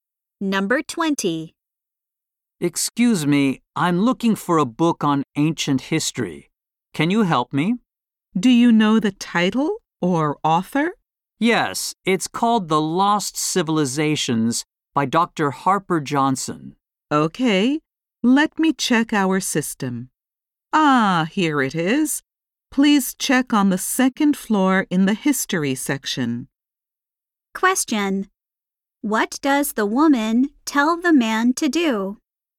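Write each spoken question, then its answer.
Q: What does the woman tell the man to do?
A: Check the history section on the second floor.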